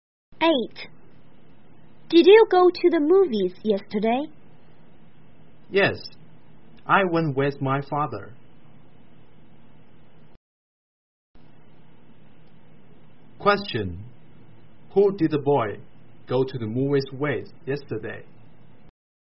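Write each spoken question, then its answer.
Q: Who did the boy go to the movies with yesterday?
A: His father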